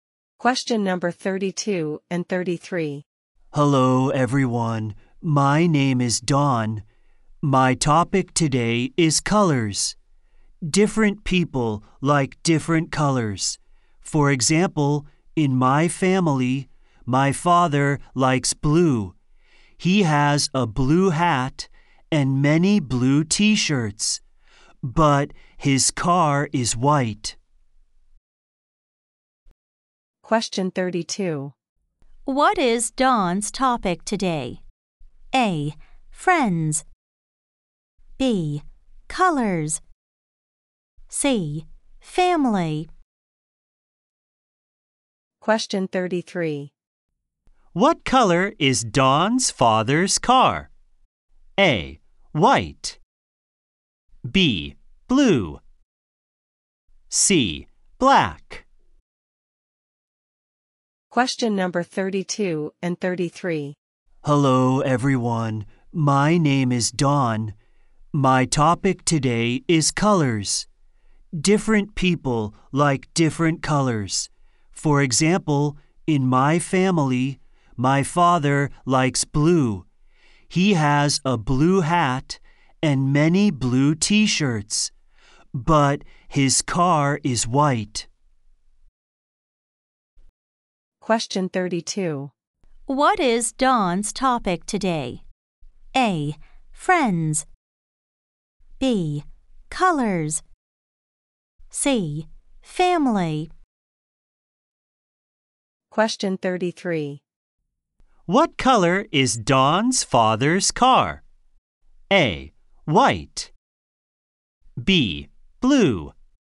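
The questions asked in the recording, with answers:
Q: What is Dawn's topic today?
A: B: Colors.

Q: What color is Dawn's father's car?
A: A: White.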